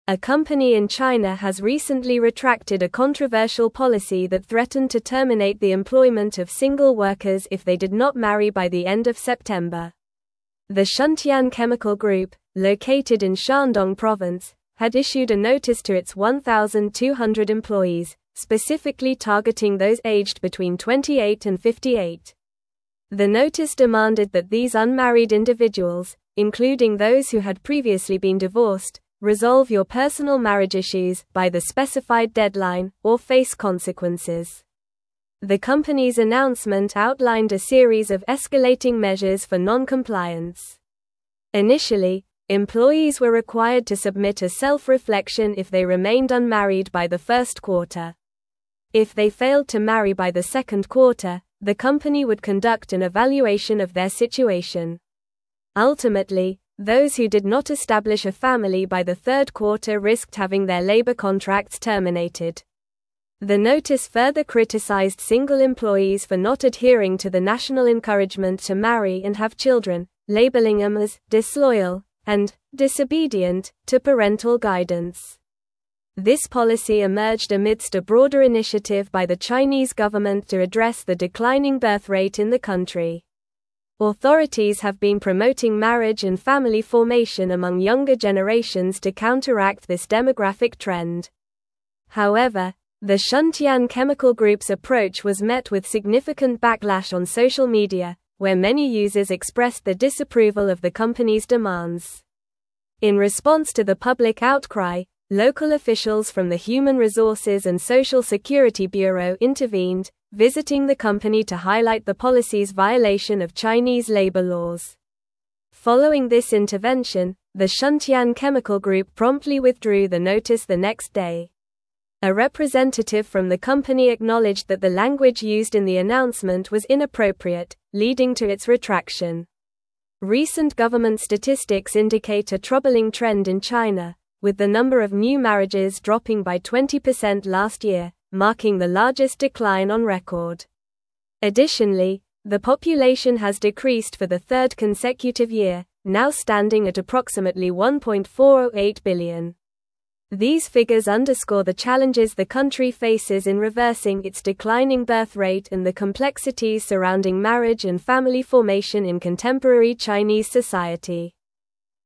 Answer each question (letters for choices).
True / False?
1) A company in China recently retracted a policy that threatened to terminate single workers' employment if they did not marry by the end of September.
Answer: True

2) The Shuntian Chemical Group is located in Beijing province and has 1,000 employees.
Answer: False

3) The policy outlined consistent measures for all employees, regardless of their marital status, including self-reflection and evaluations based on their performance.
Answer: False

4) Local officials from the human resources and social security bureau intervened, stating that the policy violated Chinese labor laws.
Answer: True

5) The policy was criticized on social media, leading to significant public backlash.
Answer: True

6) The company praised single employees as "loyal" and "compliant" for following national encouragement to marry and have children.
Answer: False

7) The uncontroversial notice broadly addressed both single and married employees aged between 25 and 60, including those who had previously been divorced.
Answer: False

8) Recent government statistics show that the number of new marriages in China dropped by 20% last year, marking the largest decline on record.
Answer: True

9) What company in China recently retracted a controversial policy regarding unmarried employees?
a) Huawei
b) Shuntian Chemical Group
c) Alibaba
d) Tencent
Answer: b

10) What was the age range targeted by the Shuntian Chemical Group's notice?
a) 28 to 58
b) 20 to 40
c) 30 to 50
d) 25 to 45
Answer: a

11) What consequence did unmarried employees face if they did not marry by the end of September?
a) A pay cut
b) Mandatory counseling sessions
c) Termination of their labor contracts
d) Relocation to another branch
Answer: c

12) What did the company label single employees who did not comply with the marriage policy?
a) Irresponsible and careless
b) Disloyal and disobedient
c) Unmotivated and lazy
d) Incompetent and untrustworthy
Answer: b

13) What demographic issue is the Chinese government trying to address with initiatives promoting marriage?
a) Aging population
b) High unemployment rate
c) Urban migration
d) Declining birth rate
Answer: d

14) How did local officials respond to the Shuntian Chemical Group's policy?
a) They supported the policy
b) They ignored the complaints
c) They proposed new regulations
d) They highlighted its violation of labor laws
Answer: d

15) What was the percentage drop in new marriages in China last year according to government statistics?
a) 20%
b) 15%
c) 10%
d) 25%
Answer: a

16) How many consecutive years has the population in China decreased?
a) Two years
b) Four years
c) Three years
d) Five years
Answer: c

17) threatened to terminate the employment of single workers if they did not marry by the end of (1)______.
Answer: September

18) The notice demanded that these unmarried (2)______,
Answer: individuals

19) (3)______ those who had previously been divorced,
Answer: including

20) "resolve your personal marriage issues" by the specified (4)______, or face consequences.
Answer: deadline

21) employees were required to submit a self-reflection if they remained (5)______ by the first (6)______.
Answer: unmarried

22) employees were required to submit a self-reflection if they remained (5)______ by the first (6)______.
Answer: quarter

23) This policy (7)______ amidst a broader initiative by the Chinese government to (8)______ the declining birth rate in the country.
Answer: emerged

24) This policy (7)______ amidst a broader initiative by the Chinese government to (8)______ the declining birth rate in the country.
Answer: address

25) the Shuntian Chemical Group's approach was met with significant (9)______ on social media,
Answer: backlash

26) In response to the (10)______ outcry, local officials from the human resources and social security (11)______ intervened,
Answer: public

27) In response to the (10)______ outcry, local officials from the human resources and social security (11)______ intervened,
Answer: bureau

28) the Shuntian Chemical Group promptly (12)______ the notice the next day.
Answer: withdrew

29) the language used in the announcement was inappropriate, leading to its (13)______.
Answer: retraction

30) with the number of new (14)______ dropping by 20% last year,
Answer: marriages

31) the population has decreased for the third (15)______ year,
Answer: consecutive

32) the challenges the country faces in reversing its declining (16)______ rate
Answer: birth

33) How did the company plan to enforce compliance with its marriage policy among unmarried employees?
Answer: The company planned to enforce compliance by requiring unmarried employees to submit self-reflections, undergo evaluations, and face potential termination of their labor contracts if they did not marry by specific deadlines.

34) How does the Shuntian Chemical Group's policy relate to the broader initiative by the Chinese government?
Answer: The policy relates to the broader initiative by the Chinese government to address the declining birth rate by promoting marriage and family formation among younger generations.

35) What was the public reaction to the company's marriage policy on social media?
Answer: The public reaction on social media was one of significant backlash, with many users expressing their disapproval of the company's demands.

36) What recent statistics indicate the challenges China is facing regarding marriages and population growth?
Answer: Recent statistics indicate that the number of new marriages dropped by 20% last year, marking the largest decline on record, and the population has decreased for the third consecutive year, now standing at approximately 1.408 billion.

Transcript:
A company in China has recently retracted a controversial policy that threatened to terminate the employment of single workers if they did not marry by the end of September. The Shuntian Chemical Group, located in Shandong province, had issued a notice to its 1,200 employees, specifically targeting those aged between 28 and 58. The notice demanded that these unmarried individuals, including those who had previously been divorced, "resolve your personal marriage issues" by the specified deadline, or face consequences.
The company's announcement outlined a series of escalating measures for non-compliance. Initially, employees were required to submit a self-reflection if they remained unmarried by the first quarter. If they failed to marry by the second quarter, the company would conduct an evaluation of their situation. Ultimately, those who did not establish a family by the third quarter risked having their labor contracts terminated. The notice further criticized single employees for not adhering to the national encouragement to marry and have children, labeling them as "disloyal" and "disobedient" to parental guidance.
This policy emerged amidst a broader initiative by the Chinese government to address the declining birth rate in the country. Authorities have been promoting marriage and family formation among younger generations to counteract this demographic trend. However, the Shuntian Chemical Group's approach was met with significant backlash on social media, where many users expressed their disapproval of the company's demands.
In response to the public outcry, local officials from the human resources and social security bureau intervened, visiting the company to highlight the policy's violation of Chinese labor laws. Following this intervention, the Shuntian Chemical Group promptly withdrew the notice the next day. A representative from the company acknowledged that the language used in the announcement was inappropriate, leading to its retraction.
Recent government statistics indicate a troubling trend in China, with the number of new marriages dropping by 20% last year, marking the largest decline on record. Additionally, the population has decreased for the third consecutive year, now standing at approximately 1.408 billion. These figures underscore the challenges the country faces in reversing its declining birth rate and the complexities surrounding marriage and family formation in contemporary Chinese society.

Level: Level 4